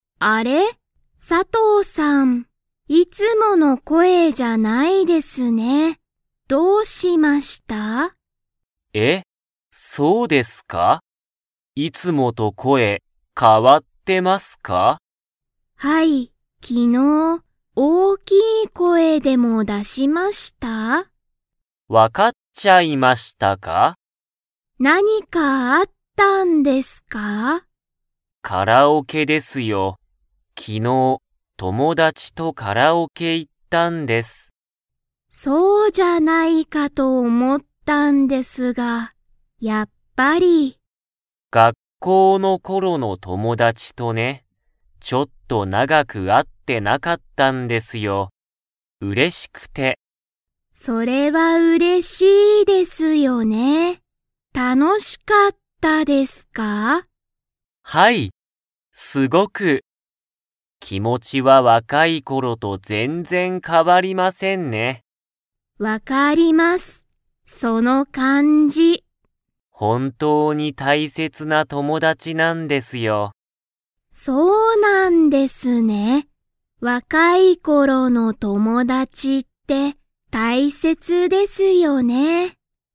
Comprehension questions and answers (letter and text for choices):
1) 佐藤(さとう)さんは昨日(きのう)、どこに行(い)きましたか?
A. カフェ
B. レストラン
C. カラオケ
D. 会社(かいしゃ)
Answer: C. カラオケ

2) 田中(たなか)さんは、若(わか)い頃(ころ)の友達(ともだち)は____だ、と言(い)った。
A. 大変(たいへん)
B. 大切(たいせつ)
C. 普通(ふつう)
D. いろいろ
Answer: B. 大切(たいせつ)